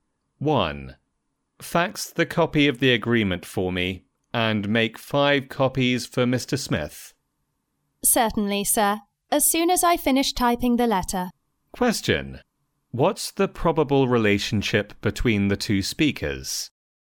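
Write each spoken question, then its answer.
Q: What's the probable relationship between the two speakers?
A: Boss and secretary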